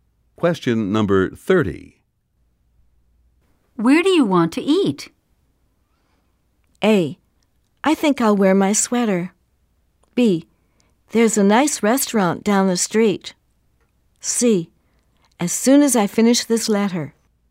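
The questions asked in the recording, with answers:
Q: Where do you want to eat?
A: B: There's a nice restaurant down the street.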